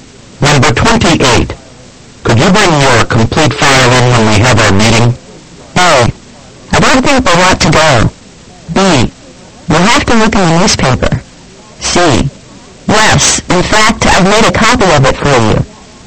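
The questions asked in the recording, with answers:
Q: Could you bring your complete file in when we have our meeting?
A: C: Yes, in fact, I've made a copy of it for you.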